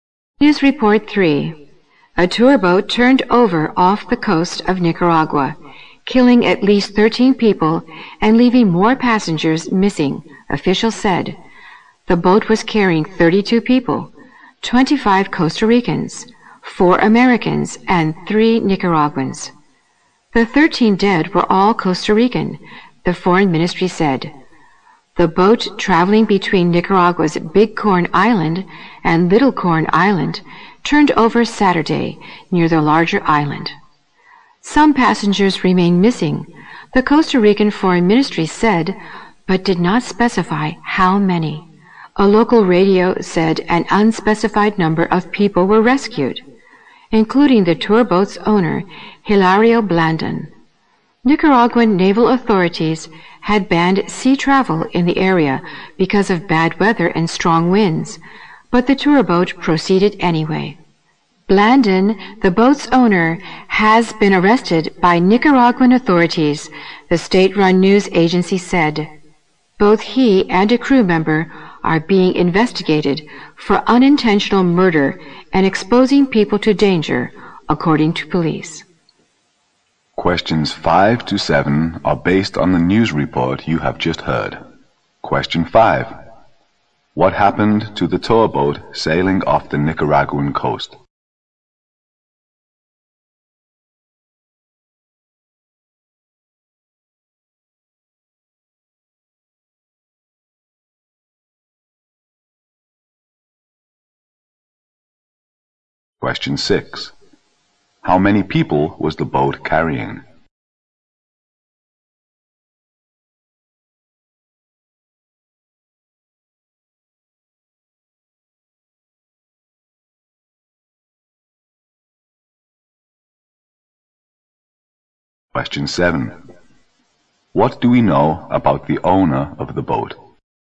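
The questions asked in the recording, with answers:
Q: What happened to the tour boat sailing off the Nicaraguan coast?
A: It turned over

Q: How many people was the boat carrying?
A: 32

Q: What do we know about the owner of the boat?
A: He was rescued and then arrested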